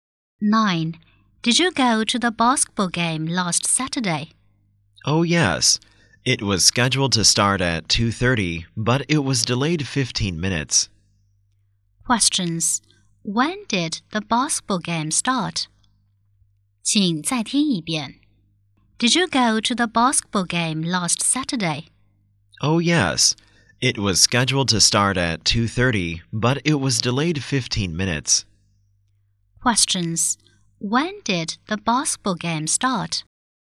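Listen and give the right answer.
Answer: At 2:45.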